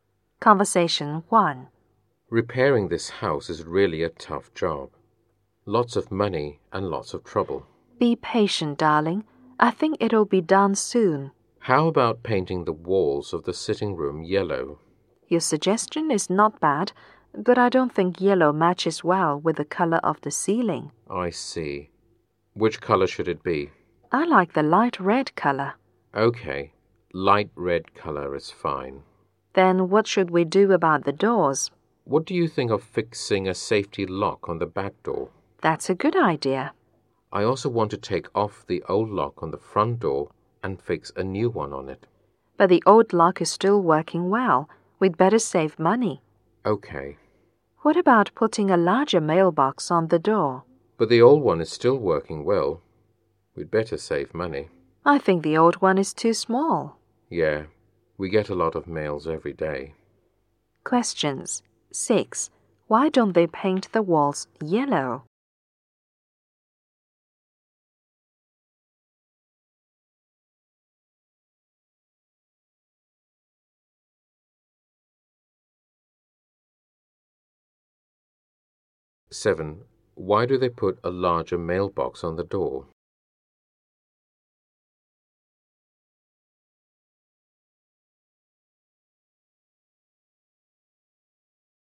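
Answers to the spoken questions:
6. Yellow doesn't match the color of the ceiling
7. The old one is too small; they get a lot of mail every day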